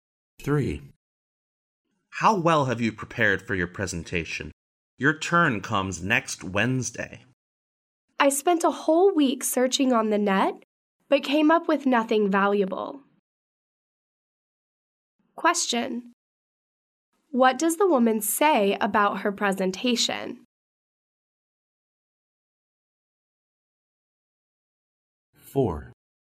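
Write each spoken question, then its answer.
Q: What does the woman say about her presentation?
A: She hasn't found anything useful for it yet.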